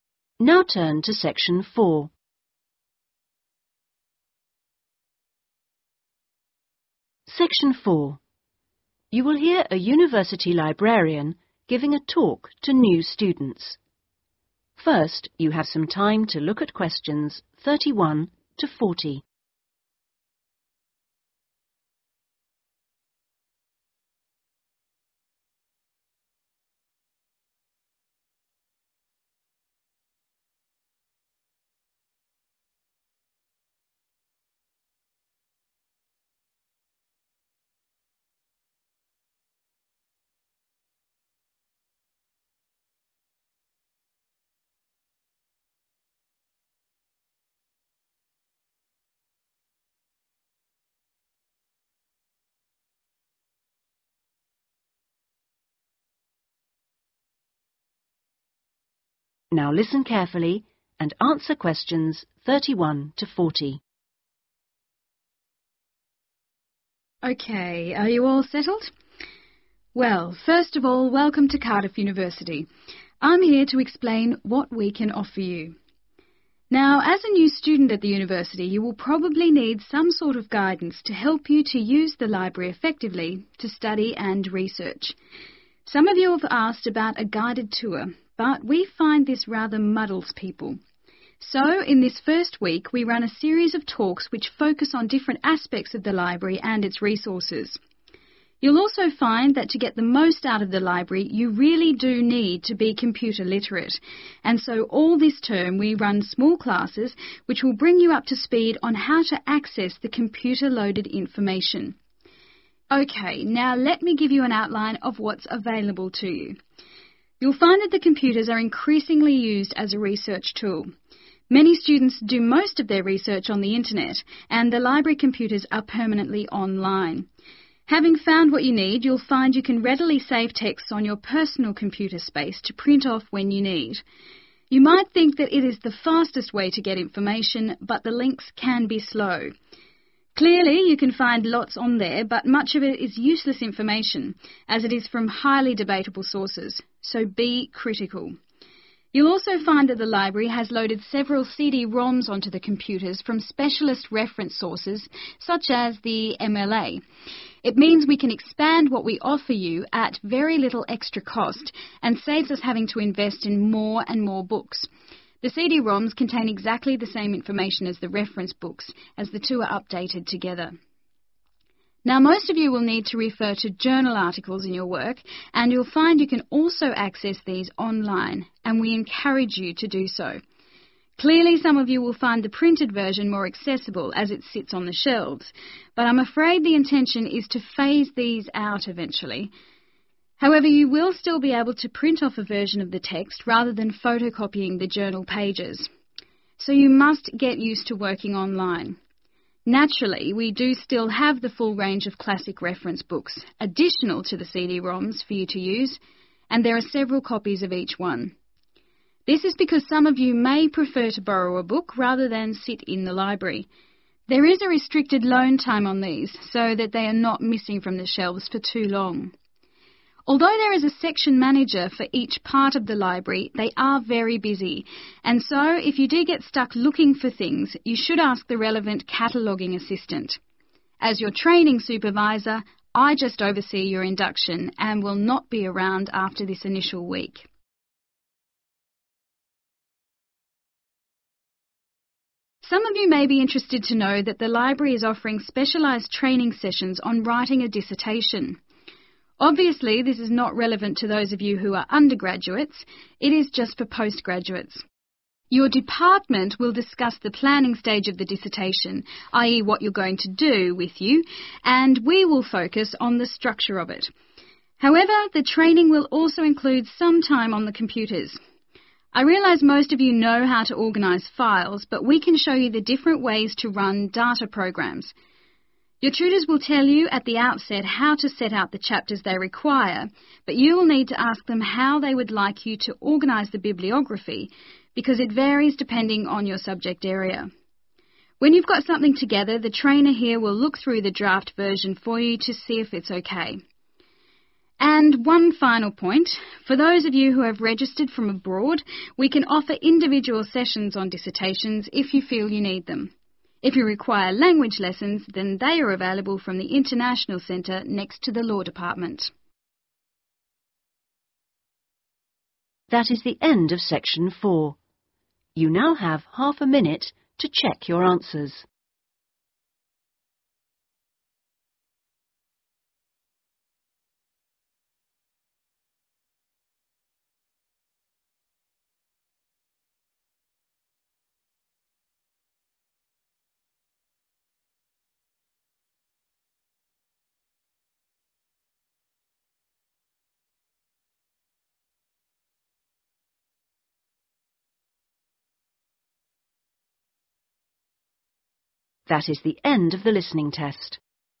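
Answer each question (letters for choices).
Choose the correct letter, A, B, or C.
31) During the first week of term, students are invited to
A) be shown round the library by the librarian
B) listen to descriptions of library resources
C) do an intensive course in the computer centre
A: B

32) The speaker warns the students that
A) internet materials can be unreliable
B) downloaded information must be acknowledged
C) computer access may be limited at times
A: A

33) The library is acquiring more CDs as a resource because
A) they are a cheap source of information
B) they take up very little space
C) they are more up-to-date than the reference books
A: A

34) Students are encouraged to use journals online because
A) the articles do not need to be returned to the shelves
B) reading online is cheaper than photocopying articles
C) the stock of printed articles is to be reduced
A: C

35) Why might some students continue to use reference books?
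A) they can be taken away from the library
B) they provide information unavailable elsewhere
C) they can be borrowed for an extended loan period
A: A

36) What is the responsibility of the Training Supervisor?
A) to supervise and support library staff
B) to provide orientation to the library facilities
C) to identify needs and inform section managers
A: B

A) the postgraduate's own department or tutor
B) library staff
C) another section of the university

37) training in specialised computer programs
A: B

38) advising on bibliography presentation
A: A

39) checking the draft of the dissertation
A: B

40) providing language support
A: C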